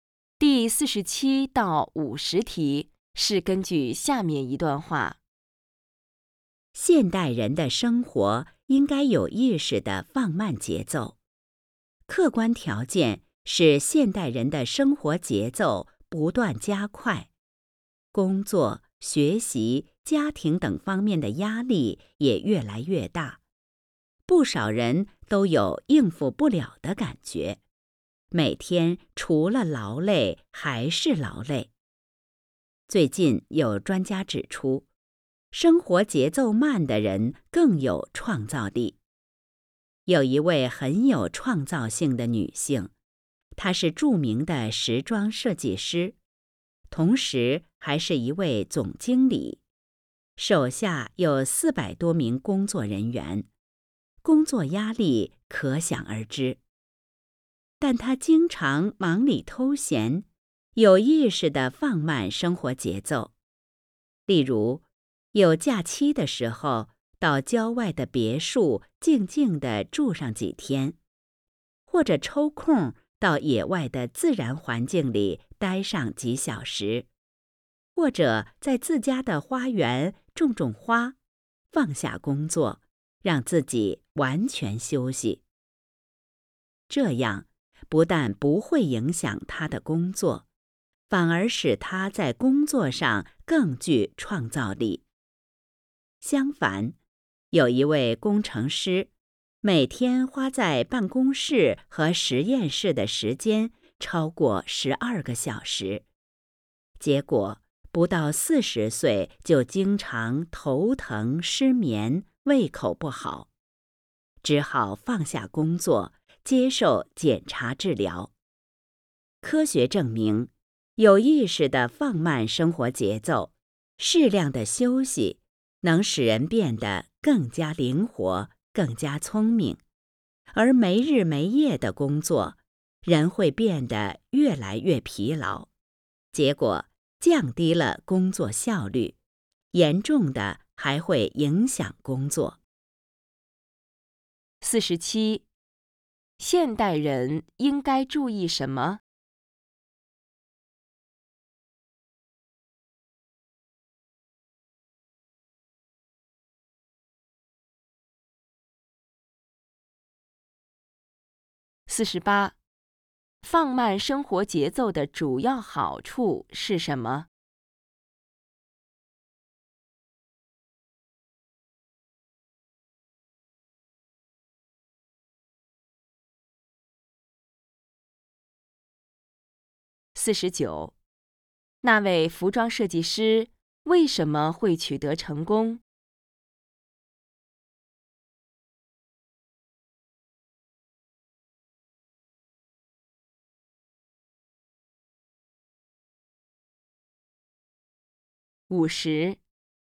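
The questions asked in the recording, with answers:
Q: 现代人应该注意什么?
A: 有意识地放慢生活节奏

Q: 放慢生活节奏的主要好处是什么?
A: 更有创造力

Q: 那位服装设计师为什么会取得成功?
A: 有意识地放慢生活节奏,适当休息

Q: 那位工程师不得不放下工作,到医院接受检查治疗的主要原因是什么?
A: 工作时间太长,过度劳累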